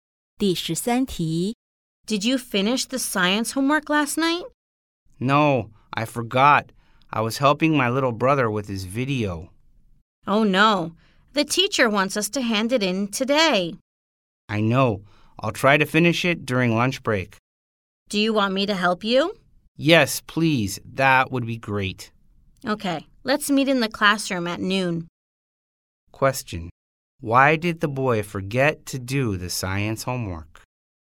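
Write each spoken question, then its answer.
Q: Why did the boy forget to do the science homework?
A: He was helping his little brother with his video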